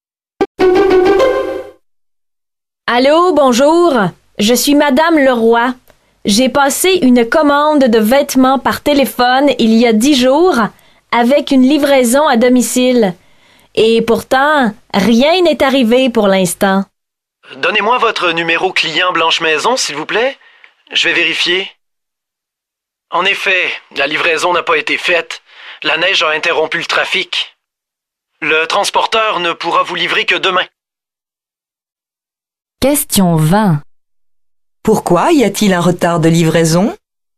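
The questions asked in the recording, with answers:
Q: Pourquoi y a-t-il un retard de livraison?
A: La neige a interrompu le trafic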